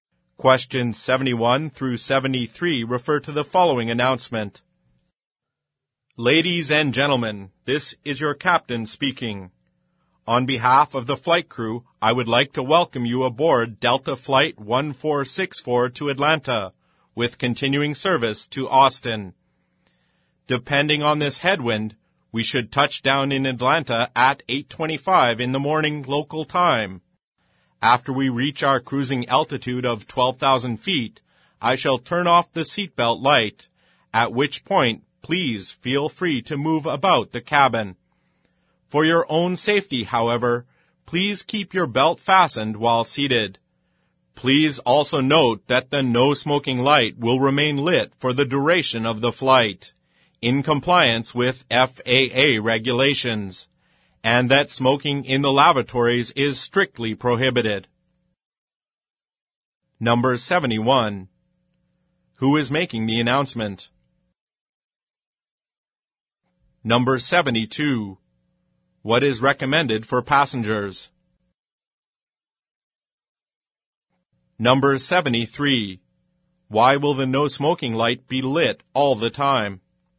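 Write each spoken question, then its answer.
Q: Who is making the announcement?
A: The captain (pilot)

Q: What is recommended for passengers?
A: Keep seatbelts fastened while seated

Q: Why will the no smoking light be lit all the time?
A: To comply with FAA regulations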